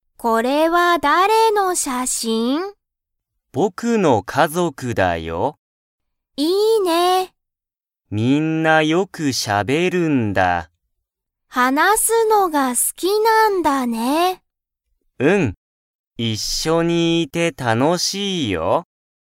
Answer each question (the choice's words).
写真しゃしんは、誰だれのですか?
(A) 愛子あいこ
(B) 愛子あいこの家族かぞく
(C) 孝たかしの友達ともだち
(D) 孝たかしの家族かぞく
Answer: 孝たかしの家族かぞく

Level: Level 1